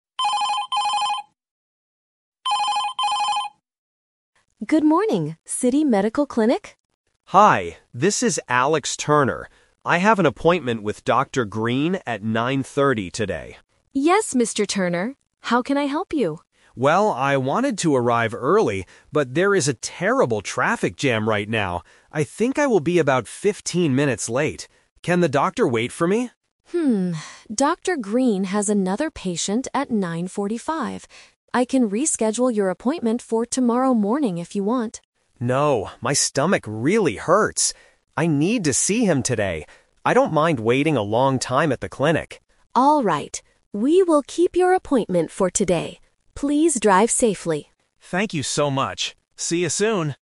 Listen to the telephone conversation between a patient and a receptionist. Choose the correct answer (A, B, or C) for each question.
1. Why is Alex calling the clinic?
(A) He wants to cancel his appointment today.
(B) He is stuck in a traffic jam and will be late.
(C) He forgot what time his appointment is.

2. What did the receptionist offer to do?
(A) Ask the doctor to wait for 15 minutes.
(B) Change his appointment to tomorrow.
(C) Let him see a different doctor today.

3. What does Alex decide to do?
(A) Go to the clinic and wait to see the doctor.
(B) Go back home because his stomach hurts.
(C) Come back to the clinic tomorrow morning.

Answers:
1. He is stuck in a traffic jam and will be late.
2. Change his appointment to tomorrow.
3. Go to the clinic and wait to see the doctor.

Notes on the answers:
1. Alex clearly says, "there is a terrible traffic jam right now. I think I will be about 15 minutes late." Trap A is wrong: He doesn't want to cancel. In fact, he really wants to keep the appointment today. Trap C is wrong: He knows his time ("I have an appointment with Dr. Green at 9:30").
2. The receptionist says, "I can reschedule your appointment for tomorrow morning if you want." Trap A is wrong: Alex asks if the doctor can wait, but the receptionist says the doctor has another patient at 9:45. She does not offer to make the doctor wait. Trap C is wrong: A different doctor is not mentioned in the audio.
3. Alex says, "I need to see him today. I don't mind waiting a long time at the clinic." Trap B is wrong: His stomach hurts, which is the reason he wants to see the doctor today, not the reason to go back home. Trap C is wrong (The Twist): The receptionist offered tomorrow morning, but Alex rejected it ("No... I need to see him today").

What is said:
Receptionist: Good morning, City Medical Clinic.
Alex: Hi, this is Alex Turner. I have an appointment with Dr. Green at 9:30 today.
Receptionist: Yes, Mr. Turner. How can I help you?
Alex: Well, I wanted to arrive early, but there is a terrible traffic jam right now. I think I will be about 15 minutes late. Can the doctor wait for me?
Dr. Green has another patient at 9:45. I can reschedule your appointment for tomorrow morning if you want.
Alex: No, my stomach really hurts. I need to see him today. I don't mind waiting a long time at the clinic.
Receptionist: Alright, we will keep your appointment for today. Please drive safely!

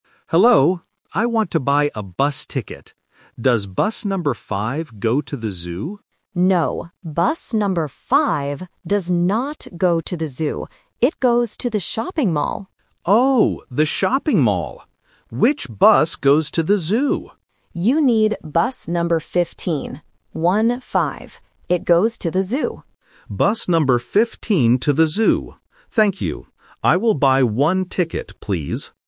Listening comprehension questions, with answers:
Listen to the conversation between a tourist and a ticket agent. Read the questions and choose the correct answer (A, B, or C).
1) Where does bus number 5 go?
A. To the Zoo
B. To the shopping mall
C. To the park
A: To the shopping mall

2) Which bus goes to the Zoo?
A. Bus number 5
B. Bus number 15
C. Bus number 50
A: Bus number 15

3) What does the tourist want to buy?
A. A map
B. A train ticket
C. A bus ticket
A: A bus ticket

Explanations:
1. The ticket agent clearly says, "It goes to the shopping mall." Why the traps are wrong: Option A is a trap because the tourist asks if bus number 5 goes to the Zoo, but the agent says "No." Option C is a plausible place but is never mentioned in the audio.
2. The agent tells the tourist, "You need bus number 15. One-Five. It goes to the Zoo." Why the traps are wrong: Option A is a trap because bus 5 goes to the shopping mall, not the Zoo. Option C (50) is a phonetic trap that sounds very similar to "15", testing if the student can hear the "-teen" sound and the clarification "One-Five".
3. The tourist says at the very beginning, "I want to buy a bus ticket." Why the traps are wrong: Option A is a plausible item for a tourist but is not mentioned. Option B is a trap using the word "ticket," but it is for a bus, not a train.

